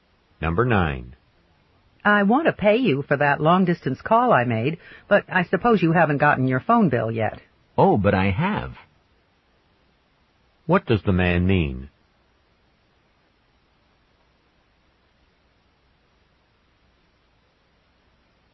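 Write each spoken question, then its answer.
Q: What does the man mean?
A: He has already received his phone bill.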